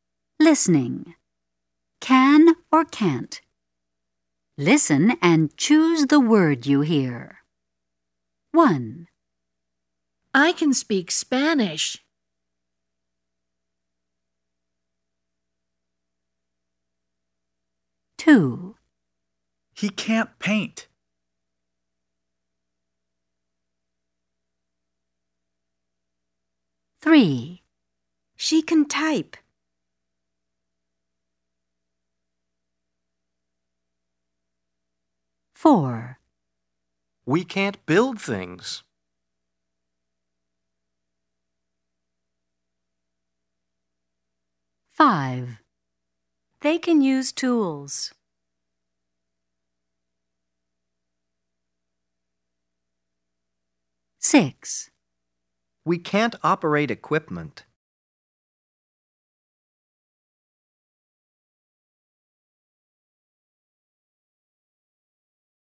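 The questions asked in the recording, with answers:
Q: Listen and choose the word you hear.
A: can

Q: Listen and choose the word you hear.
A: can't

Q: Listen and choose the word you hear.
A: can

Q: Listen and choose the word you hear.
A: can't

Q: Listen and choose the word you hear.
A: can

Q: Listen and choose the word you hear.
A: can't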